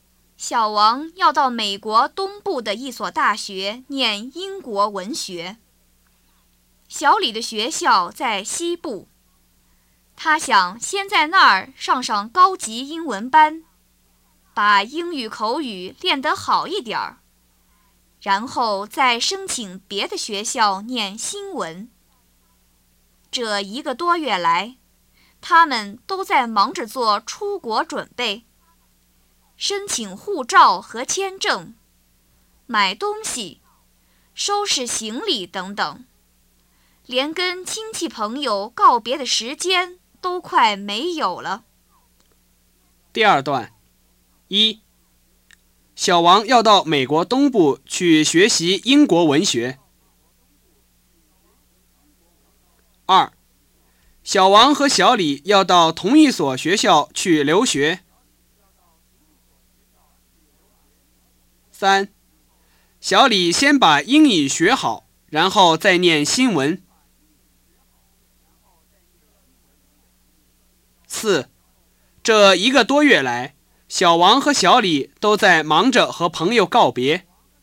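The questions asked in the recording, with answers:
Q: 小王和小李要到同一所学校去留学。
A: 不对

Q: 这一个多月来,小王和小李都在忙着和朋友告别。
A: 不对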